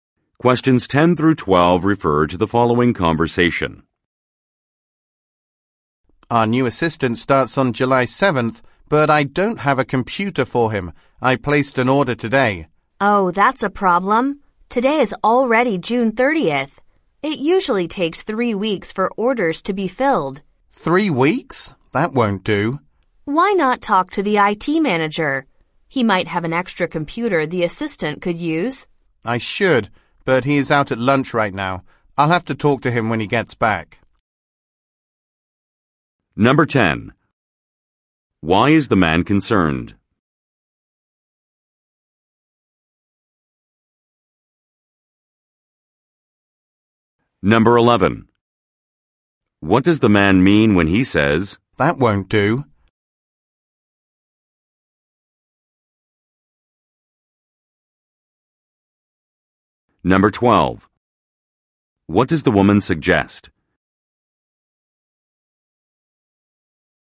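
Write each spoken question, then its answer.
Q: Why is the man concerned?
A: The new assistant has no computer, and the order will take too long.

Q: What does the man mean when he says,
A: Three weeks is too long to wait.

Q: What does the woman suggest?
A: Talking to the IT manager about an extra computer.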